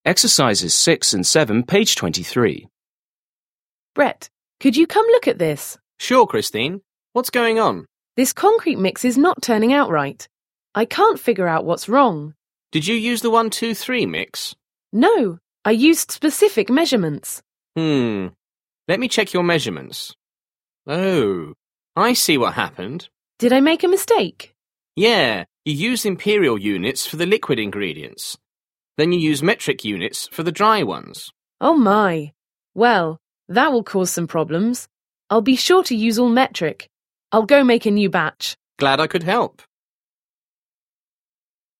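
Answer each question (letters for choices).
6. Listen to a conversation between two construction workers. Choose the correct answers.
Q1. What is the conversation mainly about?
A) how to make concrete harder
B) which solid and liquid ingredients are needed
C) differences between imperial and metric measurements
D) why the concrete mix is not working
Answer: D

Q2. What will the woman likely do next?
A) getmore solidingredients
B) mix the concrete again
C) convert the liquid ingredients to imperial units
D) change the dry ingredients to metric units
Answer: B

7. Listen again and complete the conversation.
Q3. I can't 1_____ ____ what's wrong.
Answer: figure out

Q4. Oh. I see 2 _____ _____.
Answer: what happened

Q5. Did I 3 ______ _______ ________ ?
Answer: make a mistake

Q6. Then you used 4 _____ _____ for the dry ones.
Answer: metric units

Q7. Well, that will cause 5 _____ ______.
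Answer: some problems

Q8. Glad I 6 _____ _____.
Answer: could help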